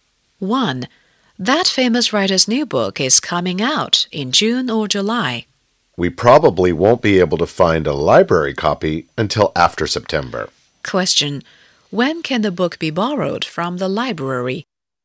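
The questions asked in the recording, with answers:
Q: When can the book be borrowed from the library?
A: After September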